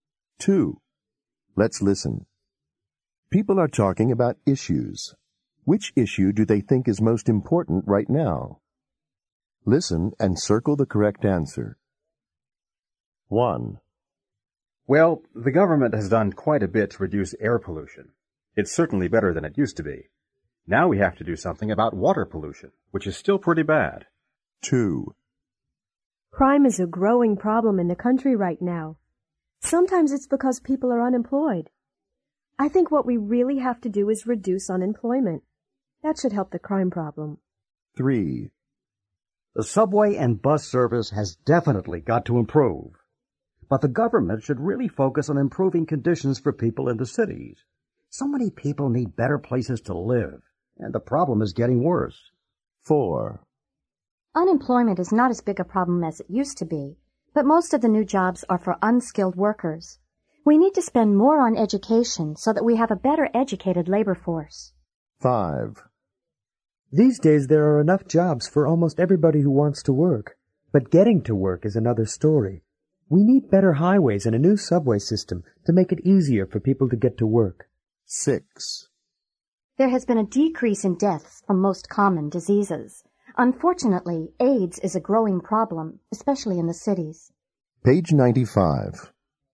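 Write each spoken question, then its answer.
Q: Which issue do they think is most important right now?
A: water pollution

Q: Which issue do they think is most important right now?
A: unemployment

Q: Which issue do they think is most important right now?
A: housing in the cities

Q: Which issue do they think is most important right now?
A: education

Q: Which issue do they think is most important right now?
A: transportation (highways and subway)

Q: Which issue do they think is most important right now?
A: AIDS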